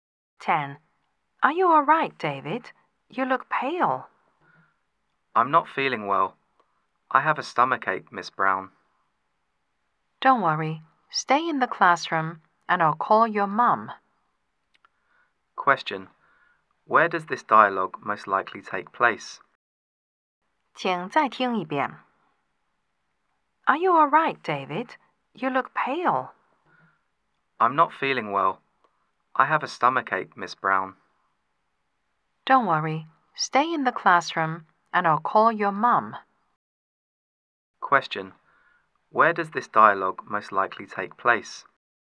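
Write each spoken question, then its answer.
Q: Where does this dialogue most likely take place?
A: In a classroom / at school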